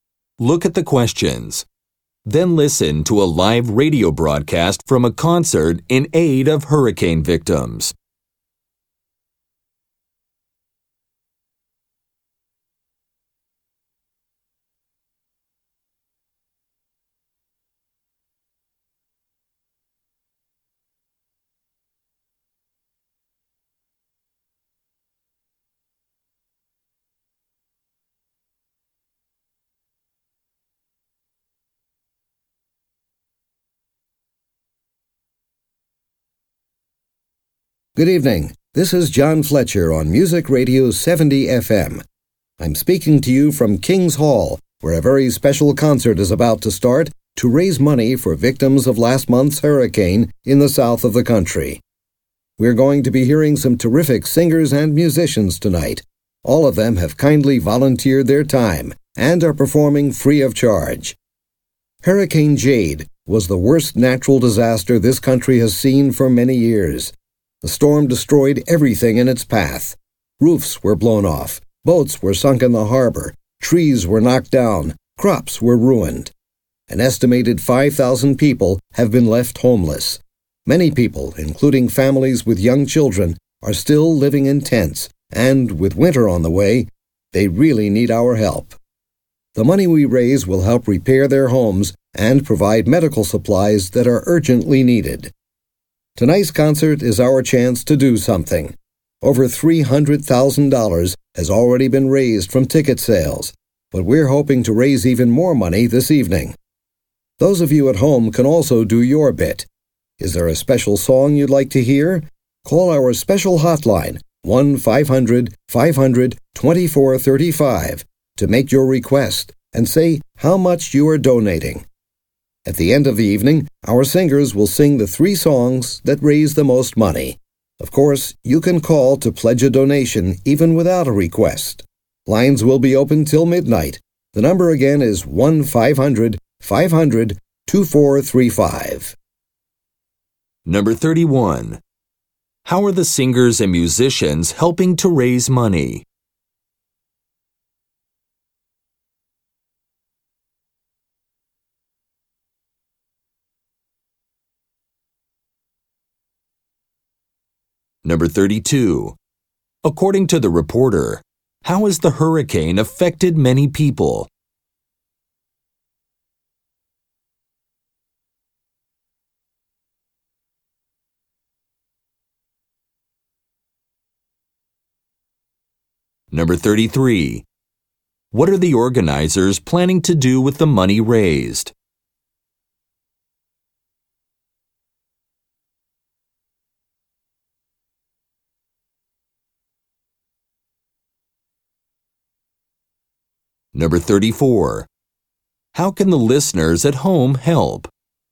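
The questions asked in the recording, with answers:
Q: How are the singers and musicians helping to raise money?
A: They are performing free of charge

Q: According to the reporter, how has the hurricane affected many people?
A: They have been left homeless

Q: What are the organizers planning to do with the money raised?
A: Repair homes and provide medical supplies

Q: How can the listeners at home help?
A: Call the hotline to pledge a donation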